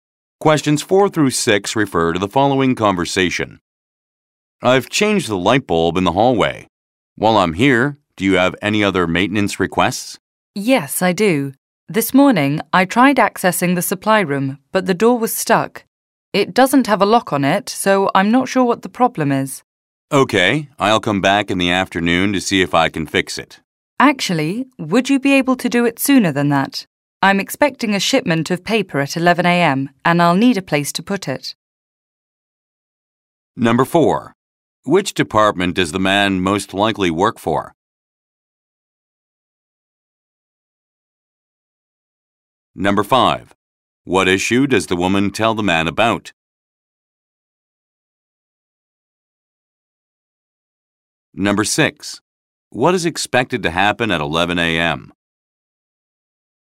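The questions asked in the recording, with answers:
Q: Which department does the man most likely work for?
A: Maintenance

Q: What issue does the woman tell the man about?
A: The supply room door is stuck

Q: What is expected to happen at 11 a.m.?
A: A shipment of paper will arrive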